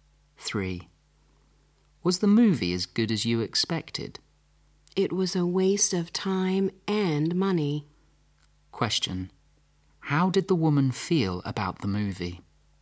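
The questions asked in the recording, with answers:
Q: How did the woman feel about the movie?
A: It was a waste of time and money.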